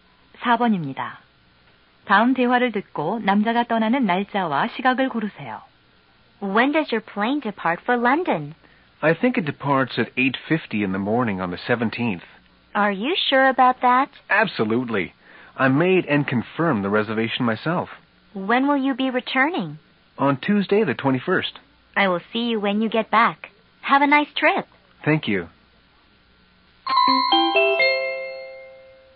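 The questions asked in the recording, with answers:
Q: 다음 대화를 듣고 남자가 떠나는 날짜와 시각을 고르세요.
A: 17일 오전 8시 50분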